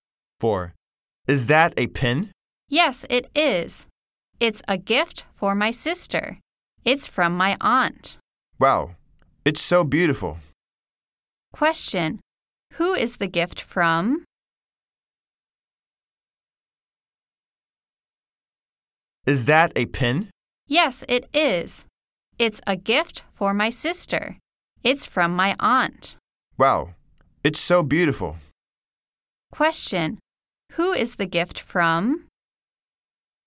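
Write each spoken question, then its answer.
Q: who is the gift from?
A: Her aunt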